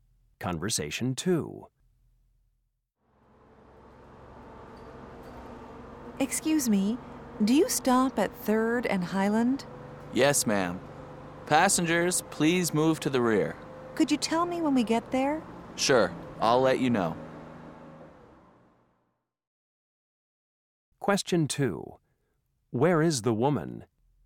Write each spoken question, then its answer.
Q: Where is the woman?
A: Is the bus always this crowded?